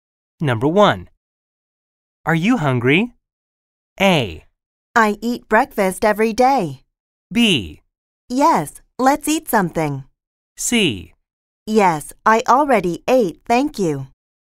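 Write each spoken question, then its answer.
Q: Are you hungry?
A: B: Yes, let's eat something.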